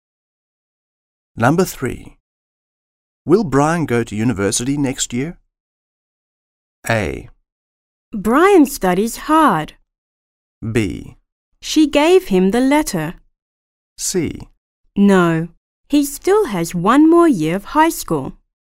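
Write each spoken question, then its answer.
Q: Will Brian go to university next year?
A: C: No, he still has one more year of high school.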